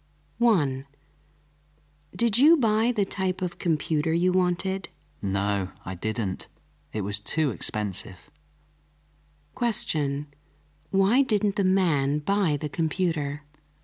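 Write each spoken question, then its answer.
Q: Why didn't the man buy the computer?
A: It was too expensive.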